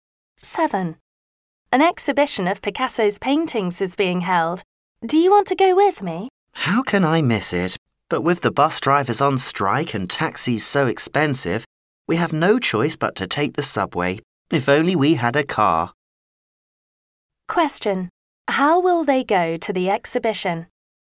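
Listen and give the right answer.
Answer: By subway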